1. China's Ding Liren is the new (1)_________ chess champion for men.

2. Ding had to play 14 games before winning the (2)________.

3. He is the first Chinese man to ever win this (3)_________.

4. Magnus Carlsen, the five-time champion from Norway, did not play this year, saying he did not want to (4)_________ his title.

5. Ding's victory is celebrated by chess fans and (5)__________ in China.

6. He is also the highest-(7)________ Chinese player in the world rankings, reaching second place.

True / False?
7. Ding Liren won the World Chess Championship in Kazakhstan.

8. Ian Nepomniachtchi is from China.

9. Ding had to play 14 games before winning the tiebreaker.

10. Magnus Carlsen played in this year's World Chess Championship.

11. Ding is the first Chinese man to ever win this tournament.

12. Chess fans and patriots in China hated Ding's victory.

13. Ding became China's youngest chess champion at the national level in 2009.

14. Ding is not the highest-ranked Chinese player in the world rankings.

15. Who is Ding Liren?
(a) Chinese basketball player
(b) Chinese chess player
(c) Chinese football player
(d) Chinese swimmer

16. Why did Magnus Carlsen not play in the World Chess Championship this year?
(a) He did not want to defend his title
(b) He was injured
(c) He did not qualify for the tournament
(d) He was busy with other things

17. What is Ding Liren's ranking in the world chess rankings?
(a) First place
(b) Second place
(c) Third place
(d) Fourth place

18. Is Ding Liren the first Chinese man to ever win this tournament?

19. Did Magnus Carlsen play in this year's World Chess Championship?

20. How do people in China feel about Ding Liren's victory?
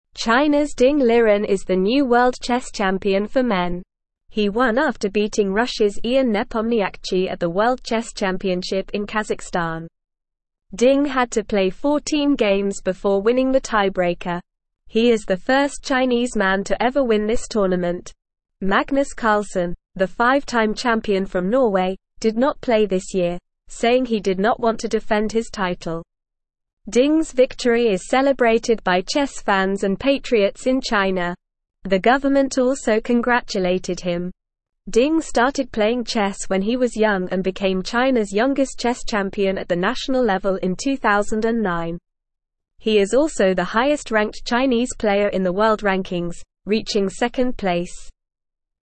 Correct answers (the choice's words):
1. world
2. tiebreaker
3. tournament
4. defend
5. patriots
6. ranked
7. True
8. False
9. True
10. False
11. True
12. False
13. True
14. False
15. Chinese chess player
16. He did not want to defend his title
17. Second place
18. Yes, Ding Liren is the first Chinese man to ever win this tournament.
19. No, Magnus Carlsen did not play in this year's World Chess Championship.
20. People in China are happy and proud of Ding Liren's victory.

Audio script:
China's Ding Liren is the new world chess champion for men. He won after beating Russia's Ian Nepomniachtchi at the World Chess Championship in Kazakhstan. He is the first Chinese man to ever win this tournament. Magnus Carlsen, the five-time champion from Norway, did not play this year, saying he did not want to defend his title. Ding's victory is celebrated by chess fans and patriots in China. The government also congratulated him. Ding started playing chess when he was young and became China's youngest chess champion at the national level in 2009. He is also the highest-ranked Chinese player in the world rankings, reaching second place.

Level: Level 1